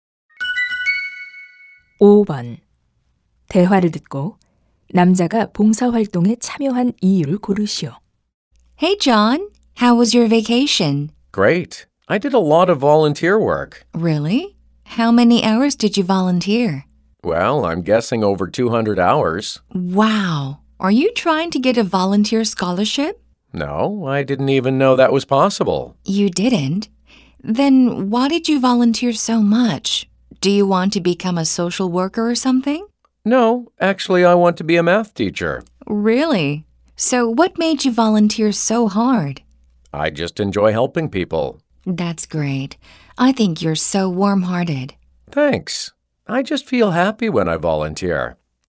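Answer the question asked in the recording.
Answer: 사람들을 돕는 것을 즐겨서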